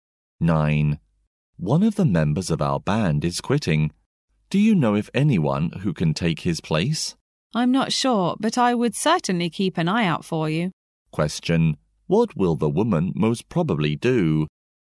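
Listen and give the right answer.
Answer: Look for someone to replace the band member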